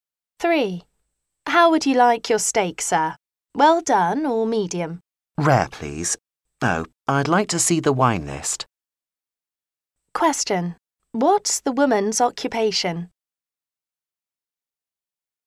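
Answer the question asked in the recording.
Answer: A waitress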